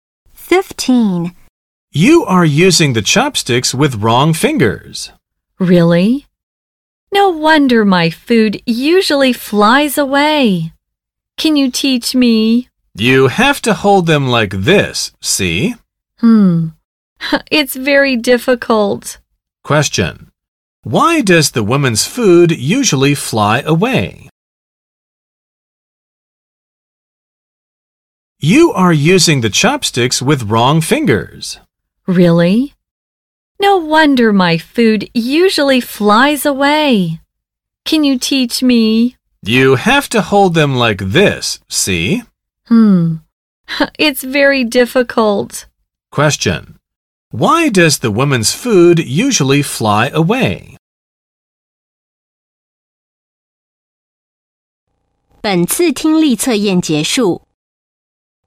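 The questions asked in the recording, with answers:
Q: why does the woman's food usually fly away?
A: She uses her chopsticks with the wrong fingers.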